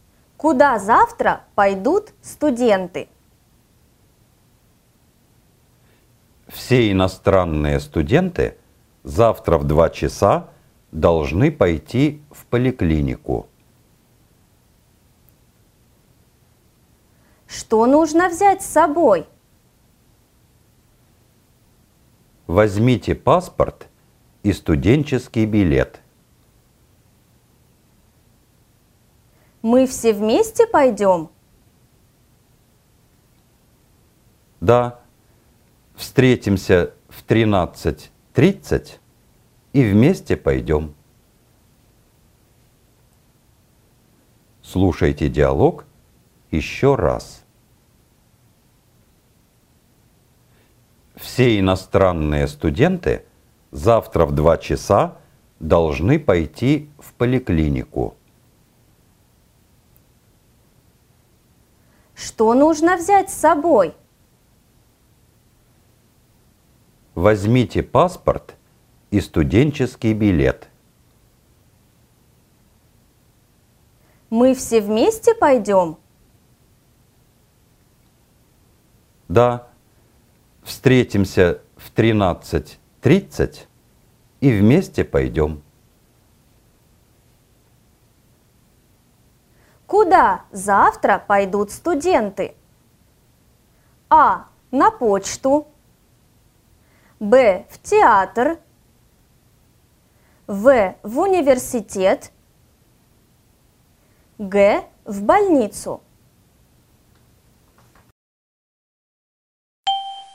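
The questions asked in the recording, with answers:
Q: Куда завтра пойдут студенты?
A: Г: В больницу.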